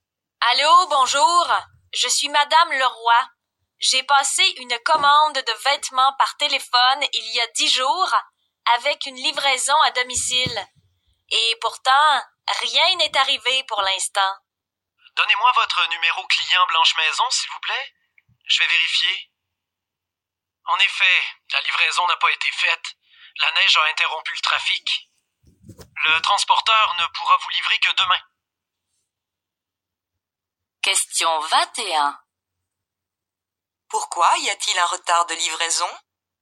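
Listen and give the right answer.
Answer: La neige a interrompu le trafic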